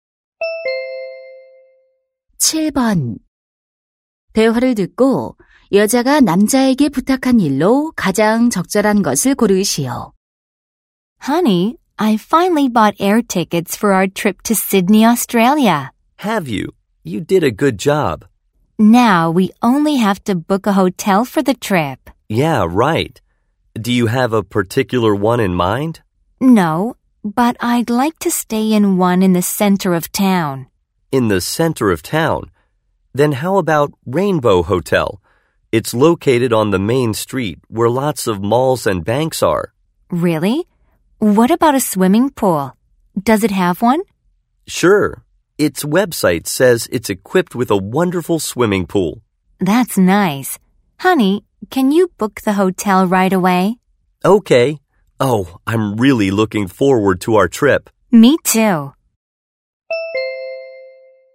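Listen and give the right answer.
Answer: 호텔 예약하기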